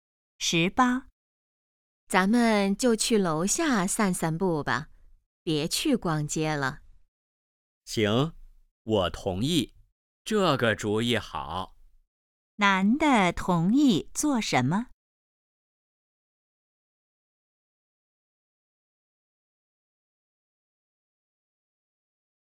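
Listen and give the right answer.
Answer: 去楼下散步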